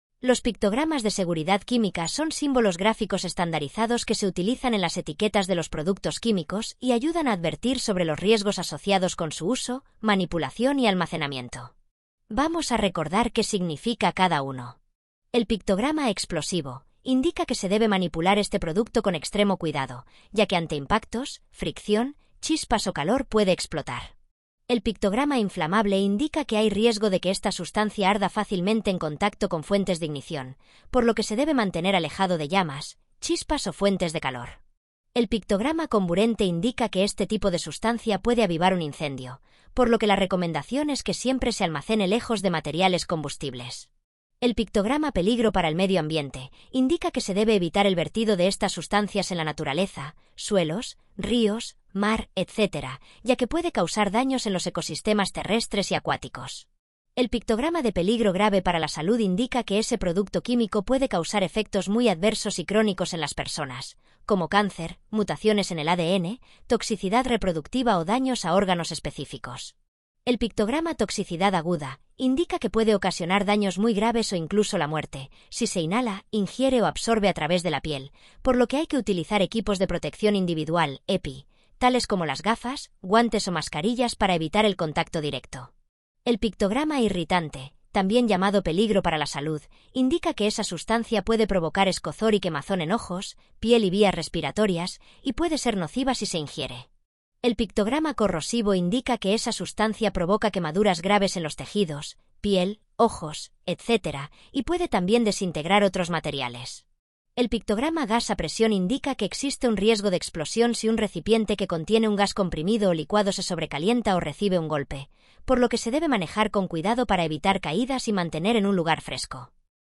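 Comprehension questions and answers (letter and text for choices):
Elige en el desplegable el nombre del pictograma que mejor encaje con su definición.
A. gas a presión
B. corrosivo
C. inflamable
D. comburente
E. peligro para la salud o irritante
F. toxicidad aguda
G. explosivo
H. peligro grave para la salud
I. peligro para el medio ambiente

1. Se debe manipular este producto con extremo cuidado, ya que ante impactos, fricción, chispas o calor puede explotar.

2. Hay riesgo de que esta sustancia arda fácilmente en contacto con fuentes de ignición, por lo que se debe mantener alejado de llamas, chispas o fuentes de calor.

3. Este tipo de sustancia puede avivar un incendio, por lo que la recomendación es que siempre se almacene lejos de materiales combustibles.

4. Se debe evitar el vertido de estas sustancias en la naturaleza (suelos, ríos, mar...), ya que puede causar daños en los ecosistemas terrestres y acuáticos.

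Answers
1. G. explosivo
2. C. inflamable
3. D. comburente
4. I. peligro para el medio ambiente

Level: Dificultad: ★☆☆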